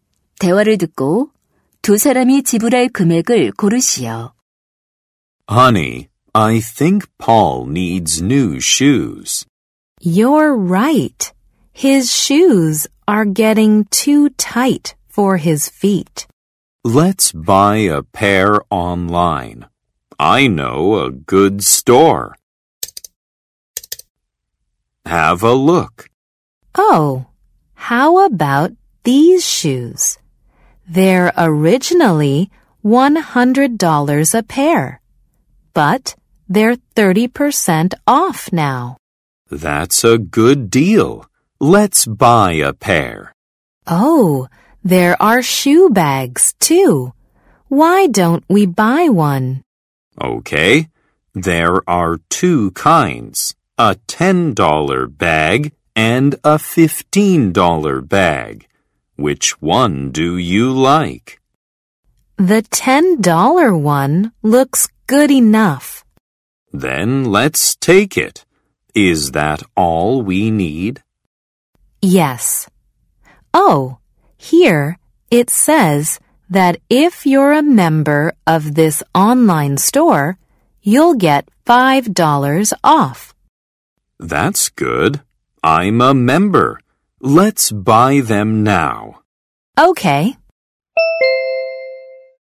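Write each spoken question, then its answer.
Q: 대화를 듣고 두 사람이 지불할 금액을 고르시오.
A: 75달러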